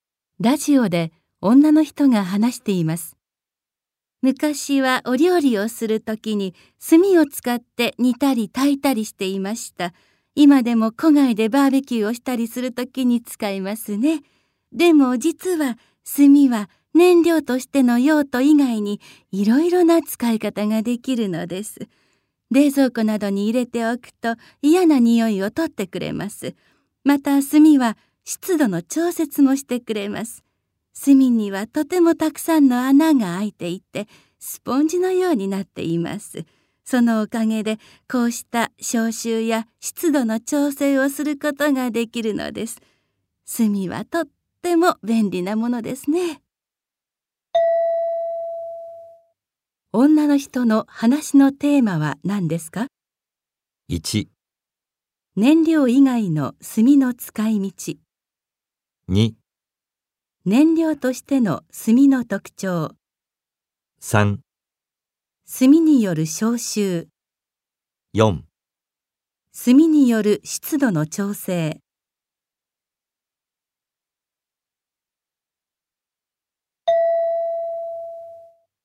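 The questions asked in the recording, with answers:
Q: 女の人の話のテーマは何ですか?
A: 1: 燃料以外の炭の使い道。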